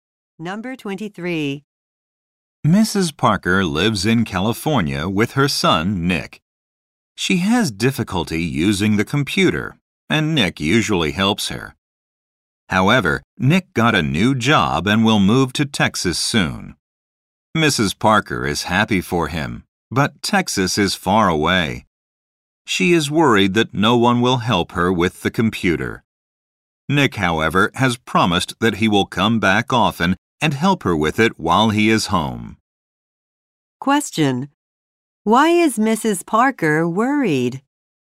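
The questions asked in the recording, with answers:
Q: Why is Mrs. Parker worried?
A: No one will help her with the computer after Nick moves.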